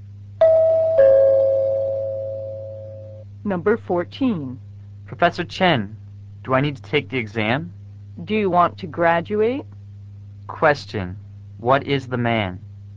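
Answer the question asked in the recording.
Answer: A student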